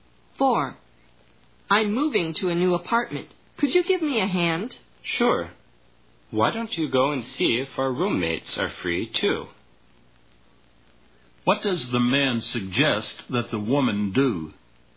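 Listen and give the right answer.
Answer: Ask their roommates if they are free to help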